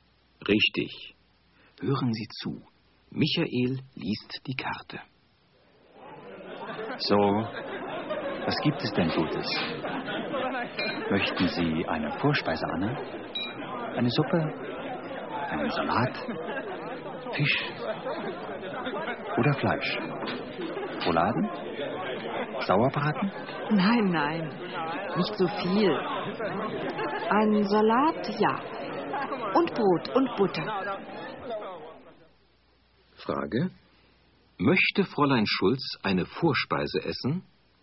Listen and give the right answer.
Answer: Nein, sie möchte keine Vorspeise.